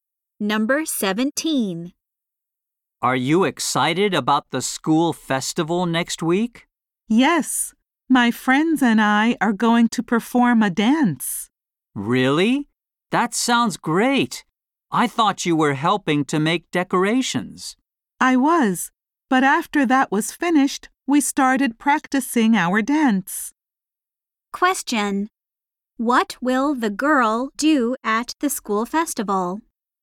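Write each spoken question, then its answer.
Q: What will the girl do at the school festival?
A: Perform a dance with her friends.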